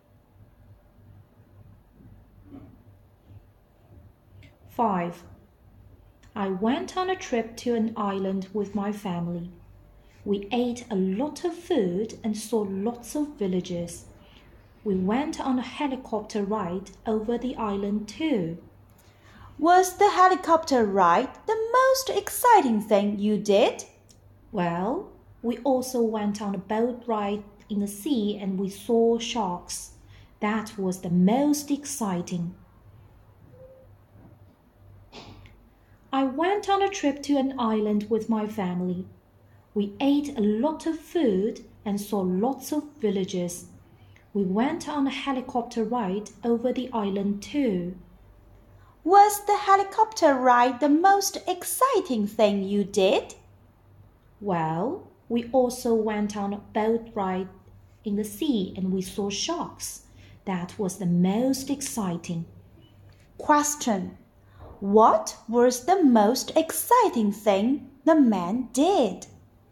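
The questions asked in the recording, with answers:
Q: What was the most exciting thing the man did?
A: The boat ride in the sea, seeing sharks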